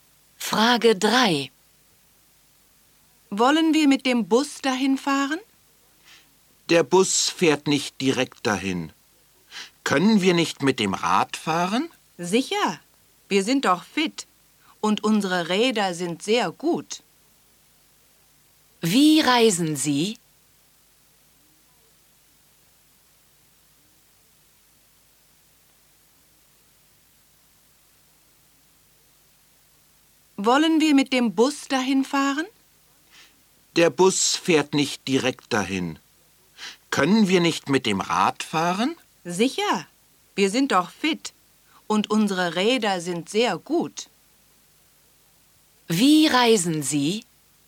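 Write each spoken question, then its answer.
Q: Wie reisen Sie?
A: Mit dem Rad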